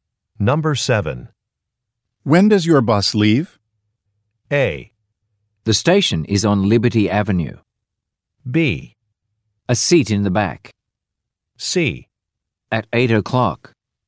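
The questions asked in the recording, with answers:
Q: When does your bus leave?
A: C: At 8 o'clock.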